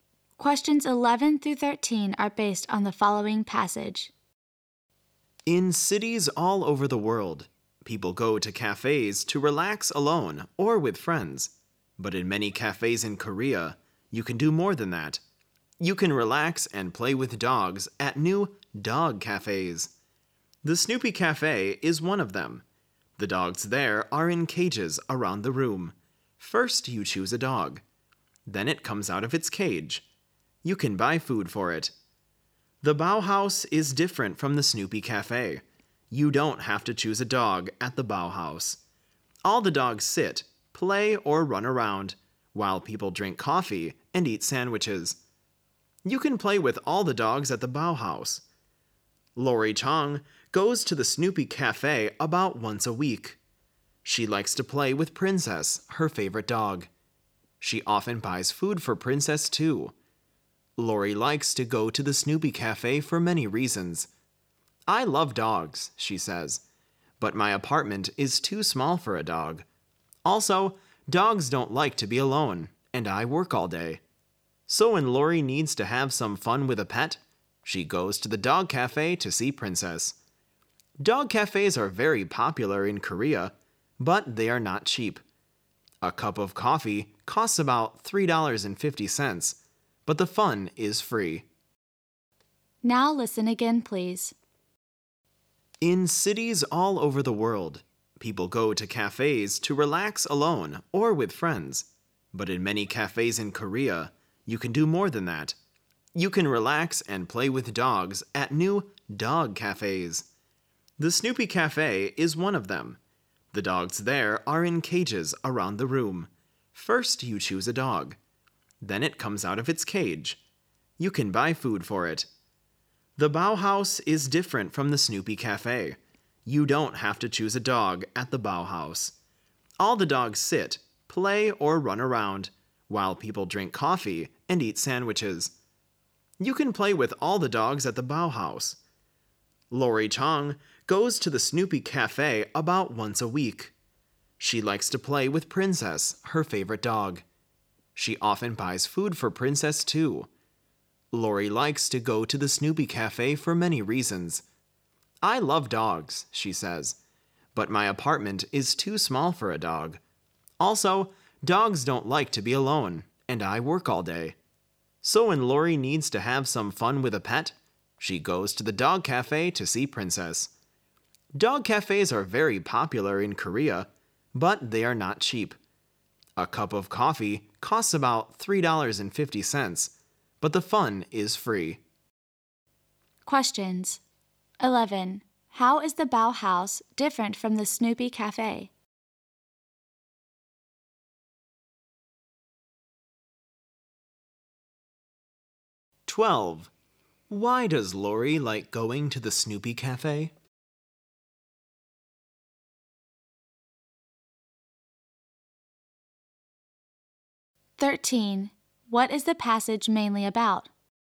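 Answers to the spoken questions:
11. You don't have to choose a dog; the dogs move around freely
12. She loves dogs but her apartment is too small and she works all day
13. Dog cafes in Korea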